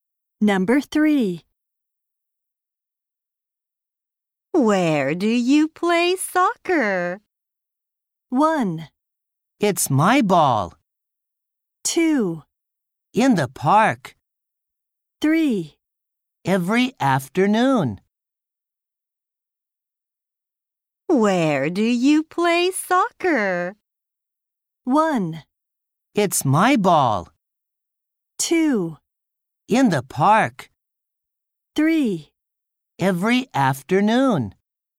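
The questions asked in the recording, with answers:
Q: Where do you play soccer?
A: 2: In the park.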